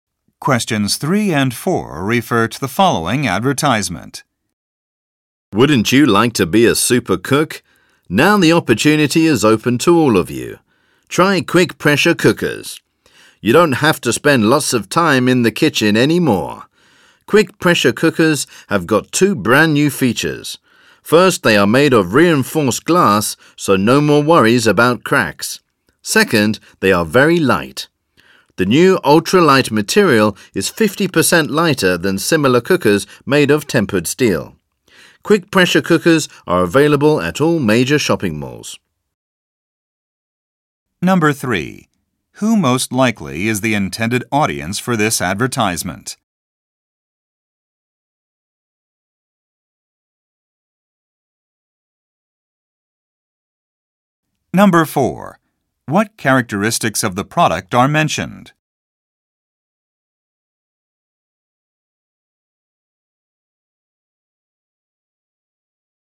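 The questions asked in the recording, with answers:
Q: What characteristics of the product are mentioned?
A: Made of reinforced glass and very light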